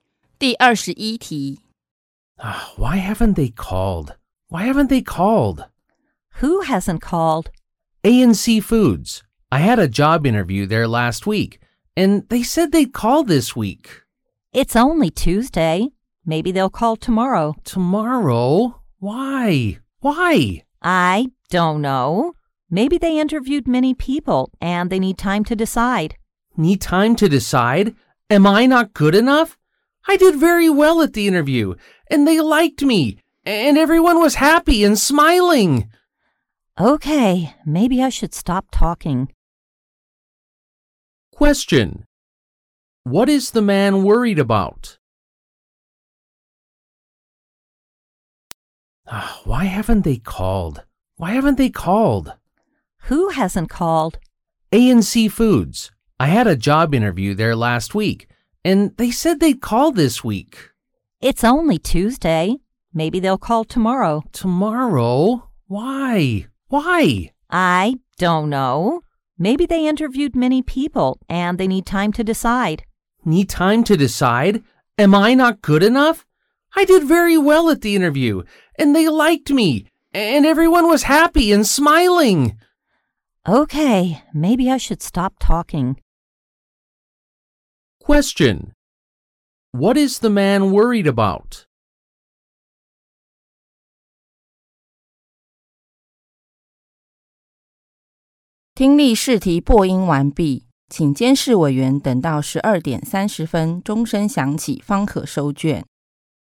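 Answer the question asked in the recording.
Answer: Whether he will get the job at ANC Foods, since they haven't called him.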